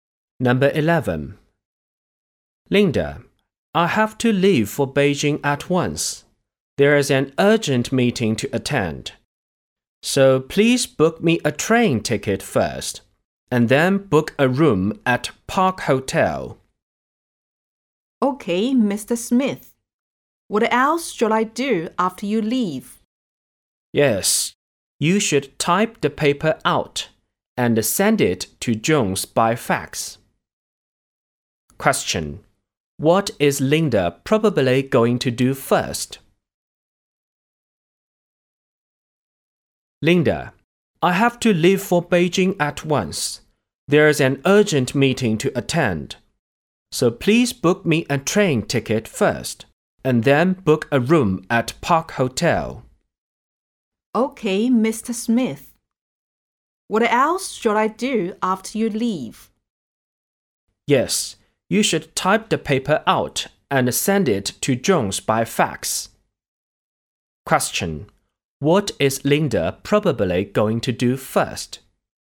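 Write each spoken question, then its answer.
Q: What is Linda probably going to do first?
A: Book a train ticket for Mr. Smith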